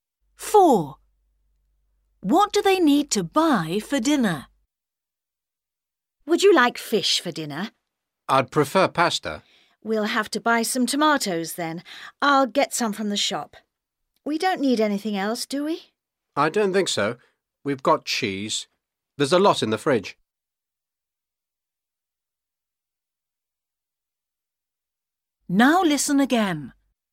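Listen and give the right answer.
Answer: tomatoes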